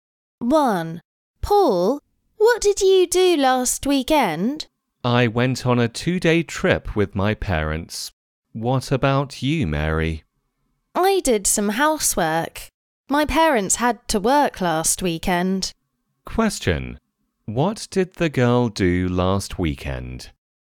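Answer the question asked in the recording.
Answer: She did some housework.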